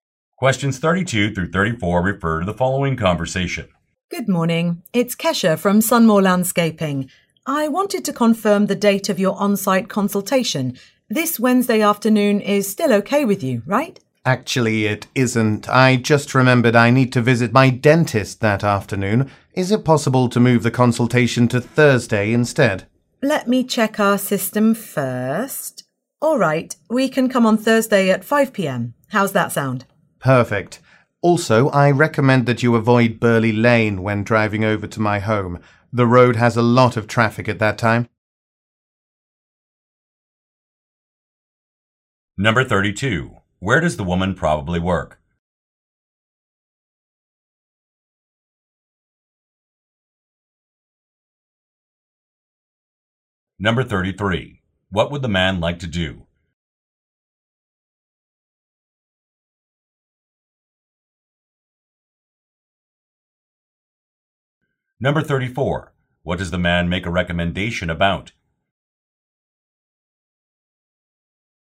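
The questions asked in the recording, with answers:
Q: Where does the woman probably work?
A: At a landscaping company

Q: What would the man like to do?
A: Move the consultation to Thursday

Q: What does the man make a recommendation about?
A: Avoiding Burley Lane because of traffic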